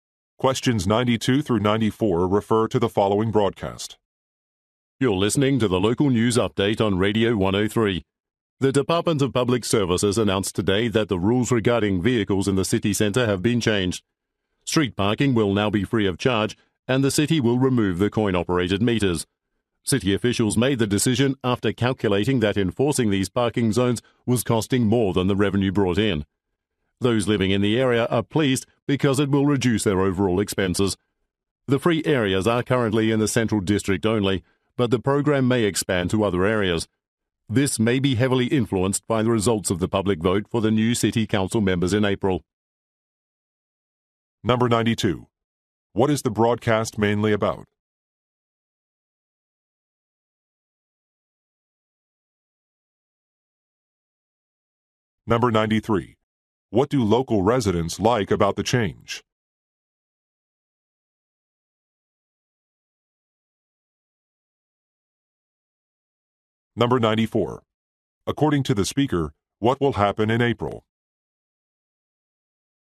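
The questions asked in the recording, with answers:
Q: What is the broadcast mainly about?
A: Free street parking in the city center

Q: What do local residents like about the change?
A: It reduces their expenses

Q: According to the speaker, what will happen in April?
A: A city council election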